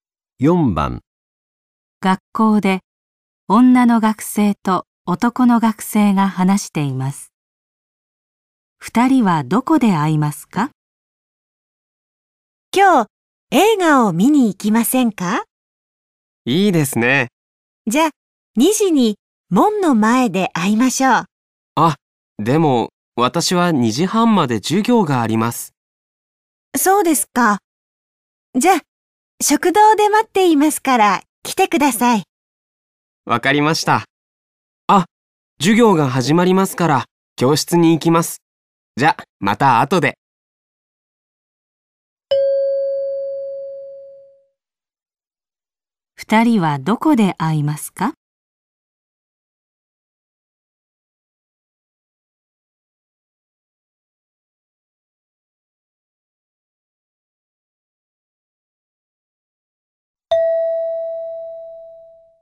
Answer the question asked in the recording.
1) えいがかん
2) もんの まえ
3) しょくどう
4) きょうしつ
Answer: 3) しょくどう

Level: N5 Listening · Test 3